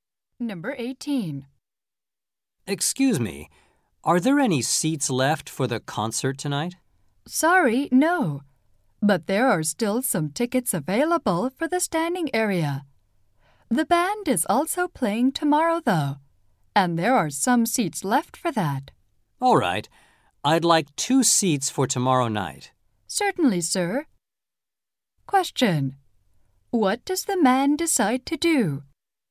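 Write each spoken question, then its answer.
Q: Question. What does the man decide to do?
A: Buy two seats for tomorrow night.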